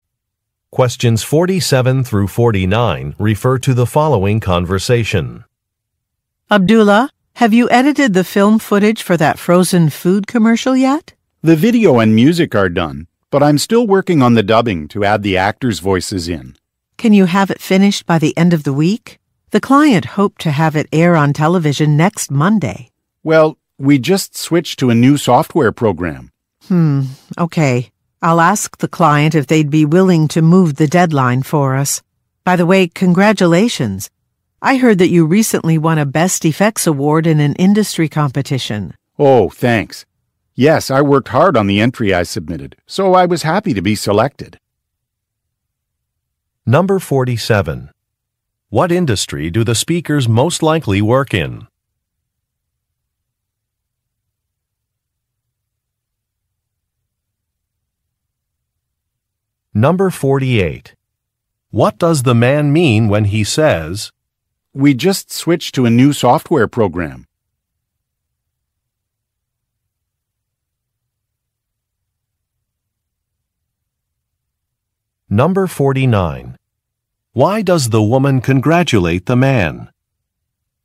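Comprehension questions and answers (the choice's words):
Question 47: What industry do the speakers most likely work in?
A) Music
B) Restaurant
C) Film production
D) Book publishing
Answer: Film production

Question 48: What does the man mean when he says, "we just switched to a new software program"?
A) He needs to consult a user's manual.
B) The quality of his work will improve.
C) A task may take longer than expected.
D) A training session should be organized.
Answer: A task may take longer than expected.

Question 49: Why does the woman congratulate the man?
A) He won an award.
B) He received a promotion.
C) He will be leading a team.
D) He developed some new software.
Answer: He won an award.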